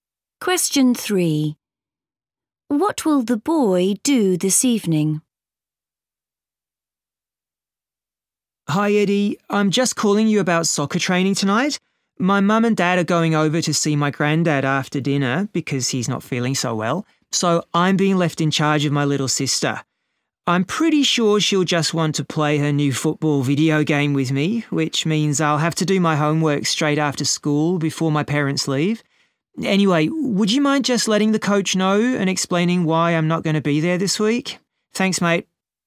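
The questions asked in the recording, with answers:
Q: What will the boy do this evening?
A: Look after his little sister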